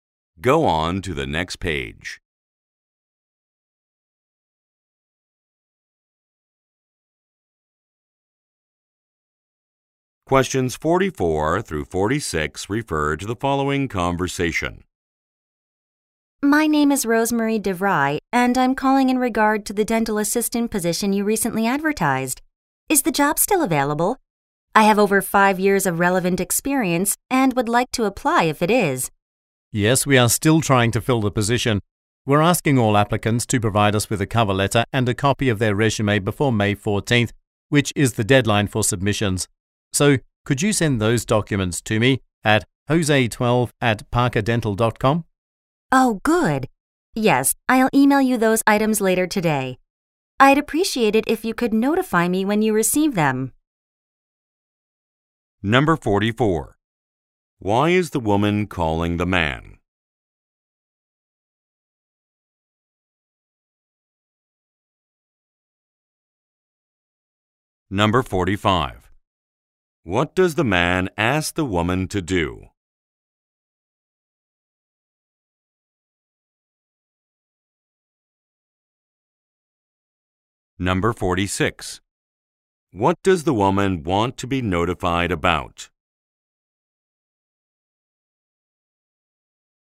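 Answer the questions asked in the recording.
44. To ask about the dental assistant job
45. Email a cover letter and resume
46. When her documents are received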